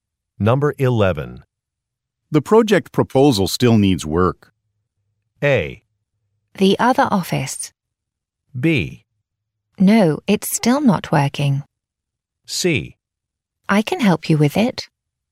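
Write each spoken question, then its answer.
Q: The project proposal still needs work.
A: C: I can help you with it.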